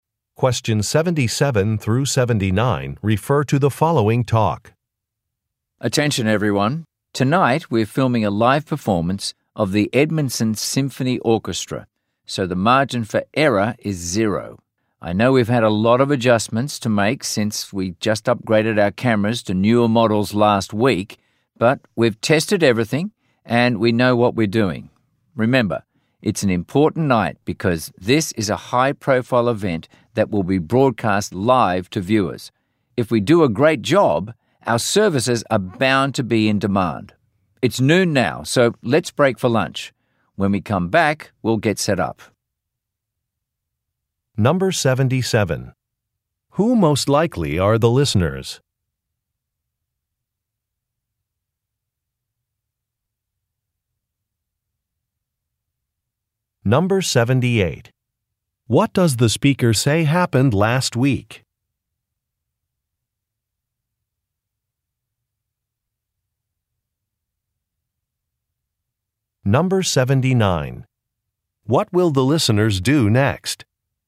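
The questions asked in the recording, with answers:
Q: Who most likely are the listeners?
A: A camera (filming) crew

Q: What does the speaker say happened last week?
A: The cameras were upgraded to newer models

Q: What will the listeners do next?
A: Break for lunch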